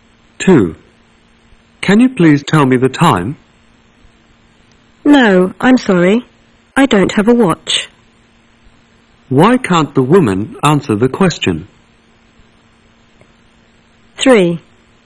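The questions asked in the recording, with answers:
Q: Why can't the woman answer the question?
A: She doesn't have a watch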